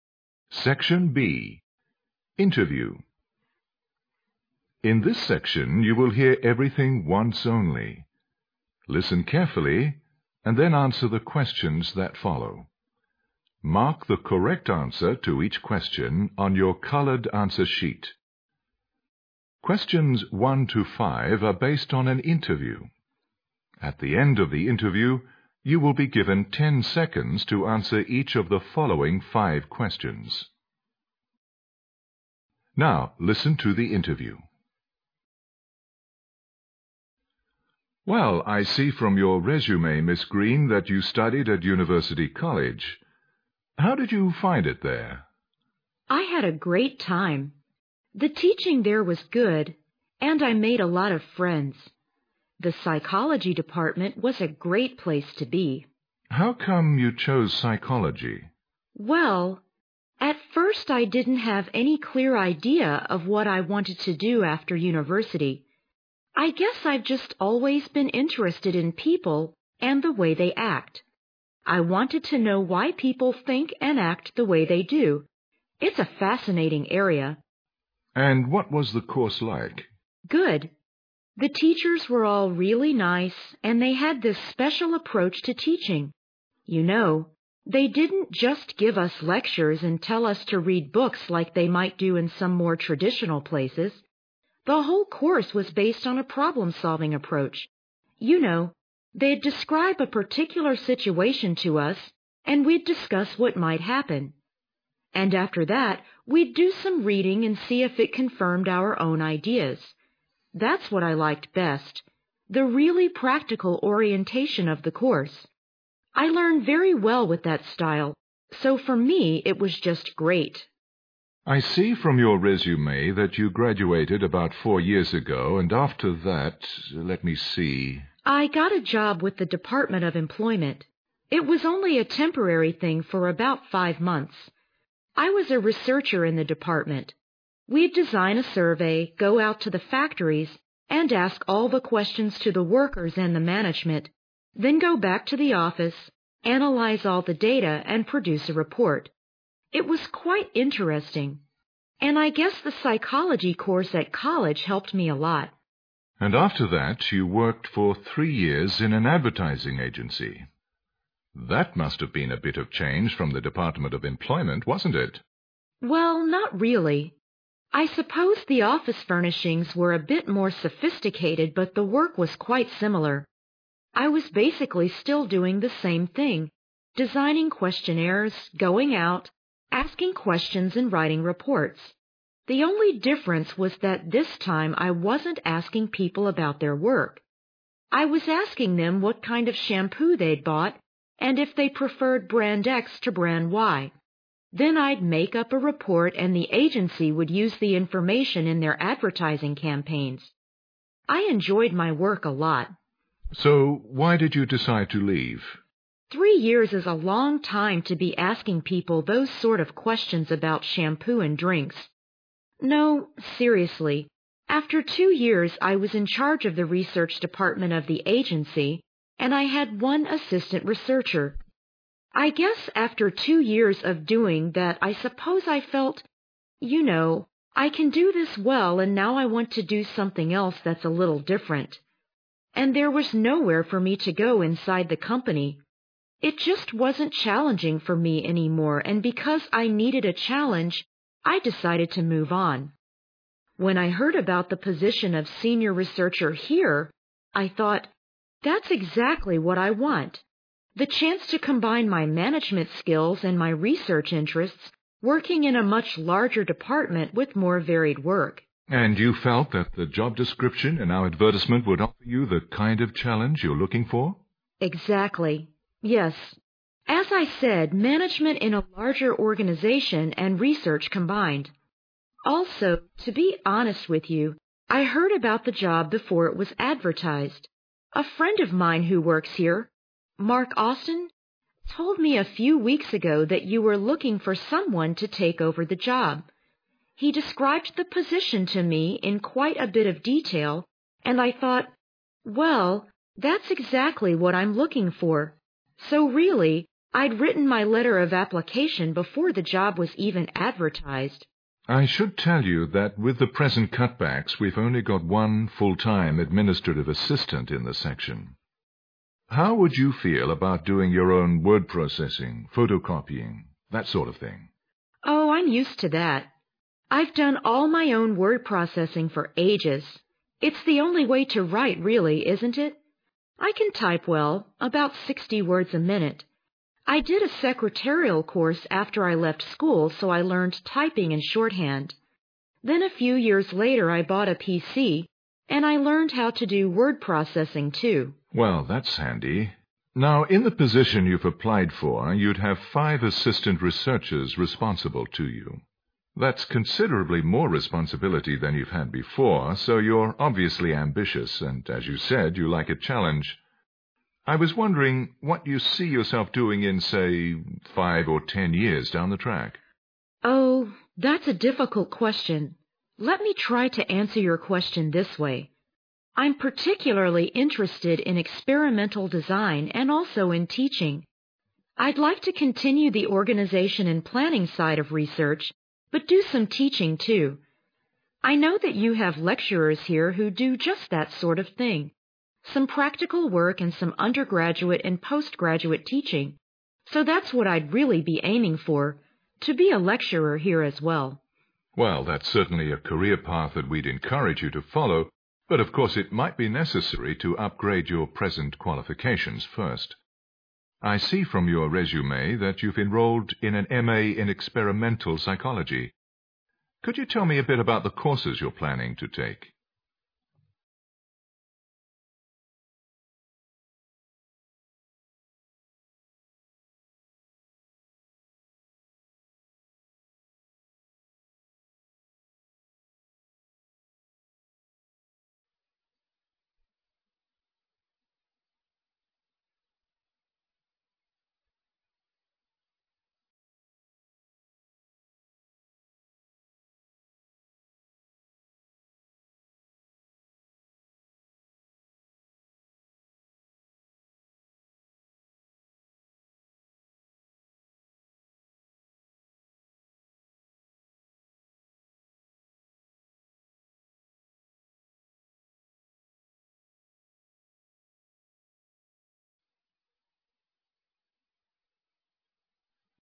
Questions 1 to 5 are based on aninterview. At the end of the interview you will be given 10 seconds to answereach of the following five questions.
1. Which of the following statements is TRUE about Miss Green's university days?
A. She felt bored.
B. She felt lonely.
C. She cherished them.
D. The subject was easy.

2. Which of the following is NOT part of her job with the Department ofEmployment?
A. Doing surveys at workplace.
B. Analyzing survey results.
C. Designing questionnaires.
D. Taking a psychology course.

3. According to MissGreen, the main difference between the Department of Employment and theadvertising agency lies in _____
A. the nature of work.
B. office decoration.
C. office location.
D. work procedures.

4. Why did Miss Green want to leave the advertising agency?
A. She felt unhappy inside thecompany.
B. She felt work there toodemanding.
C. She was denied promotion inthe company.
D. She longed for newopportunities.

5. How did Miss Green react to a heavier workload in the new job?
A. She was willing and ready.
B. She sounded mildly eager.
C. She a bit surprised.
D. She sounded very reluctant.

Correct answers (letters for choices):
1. C
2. D
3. B
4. D
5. A

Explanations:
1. 推理题。对话中MissGreen对自己大学生活的评价是"I had a great time. The teachingthere was good, and I made a lot of friends."可见,她对大学生活充满怀念。cherish珍爱;怀念。
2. 细节题。MissGreen陈述自己在"Department of Employment"的工作时提到了设计调查问卷、在工作场所作调查、分析调查结果等。"taking course"是她工作前在大学时进行的。
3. 细节题。对话中提到,工作的性质"basically the same",都是做调查,步骤也一样,只是提问的内容不一样,但选项中并没有这一项。前面Miss Green还提到"Isuppose the office furnishings were a bit more sophisticated",可见二者的办公室装饰有所不同。
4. 推理题。MissGreen对此的回答是"I want to do something else that'sa little different",可见,她辞去以前的工作是为了尝试新的东西。
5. 观点态度题。对于工作繁重的问题,Miss Green首先回答说"I'mused to that",然后介绍了自己各方面的技能。可见,她很乐意接受这份工作,故选A项。

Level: GRADE EIGHT